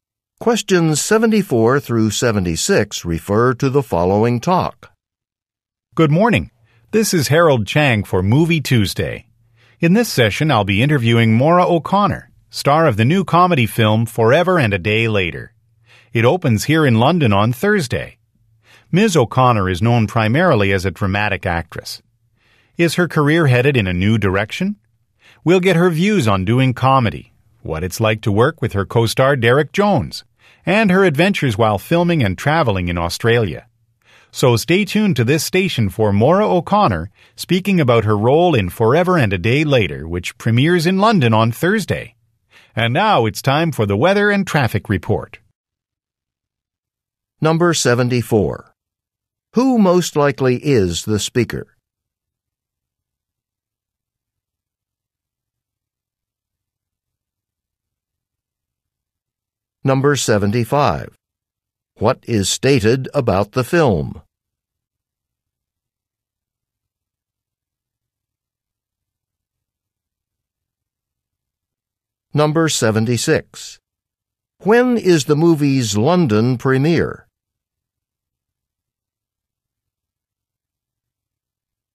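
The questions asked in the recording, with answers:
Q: Who most likely is the speaker?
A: A radio host

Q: What is stated about the film?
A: It is a comedy

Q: When is the movie's London premiere?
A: Thursday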